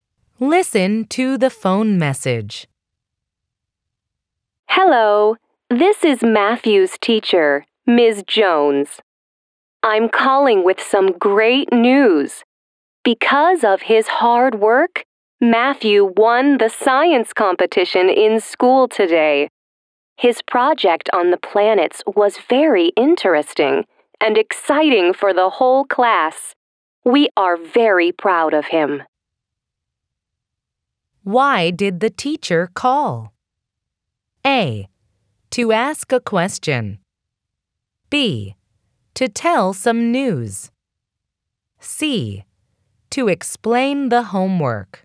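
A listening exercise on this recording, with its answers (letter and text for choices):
Why did the teacher call?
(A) To ask a question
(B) To tell some news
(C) To explain the homework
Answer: (B) To tell some news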